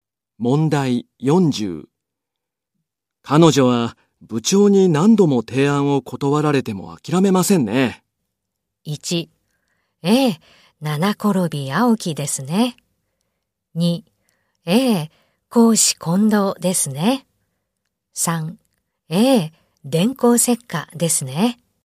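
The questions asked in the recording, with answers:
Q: 彼女は部長に何度も提案を断られても諦めませんね。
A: 1: ええ、七転び八起きですね。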